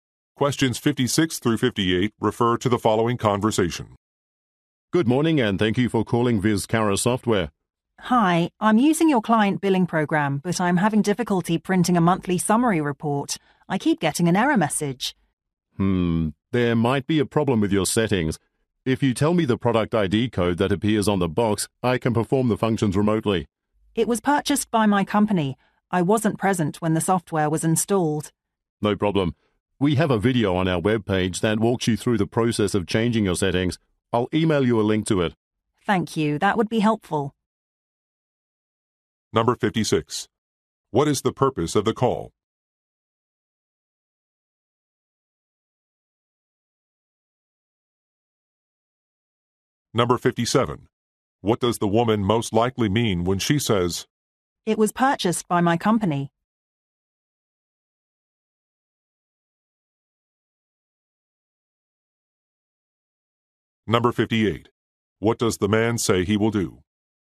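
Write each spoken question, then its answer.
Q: What is the purpose of the call?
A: To get help printing a report

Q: What does the woman most likely mean when she says,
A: She does not know the product ID code

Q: What does the man say he will do?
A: Email a link to a video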